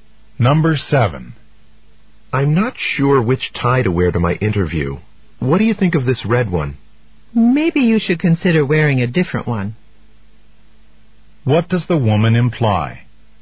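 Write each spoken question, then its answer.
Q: What does the woman imply?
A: She doesn't like the red tie.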